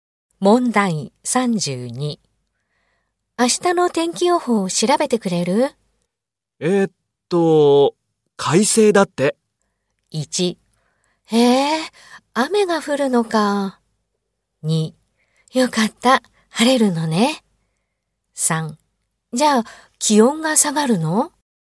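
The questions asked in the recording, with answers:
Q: 明日の天気予報を調べてくれる?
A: 2: よかった、晴れるのね。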